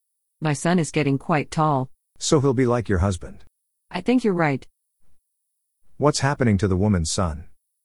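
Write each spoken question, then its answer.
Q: What's happening to the woman's son?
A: He's getting quite tall.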